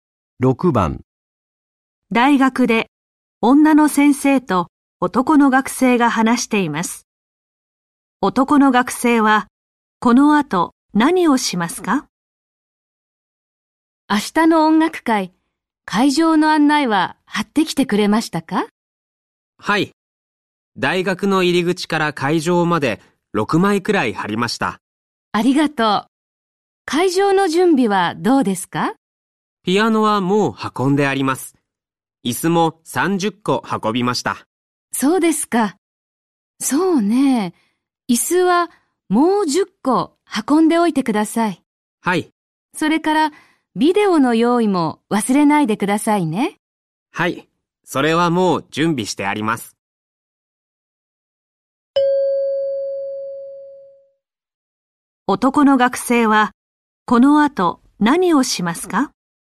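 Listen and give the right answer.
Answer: 椅子をもう10個運ぶ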